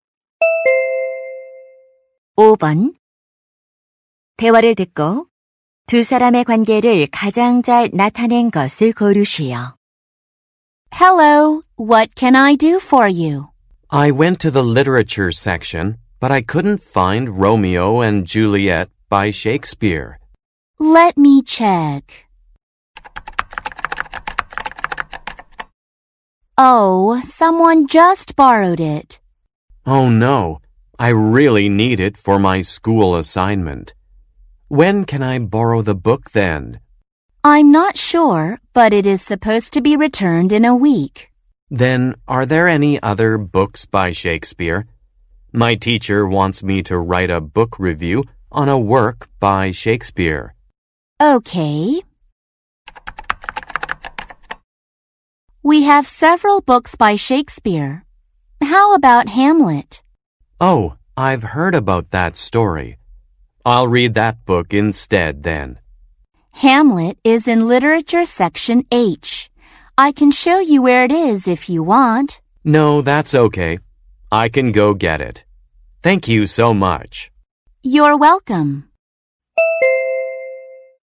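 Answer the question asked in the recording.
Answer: 도서관 사서 - 학생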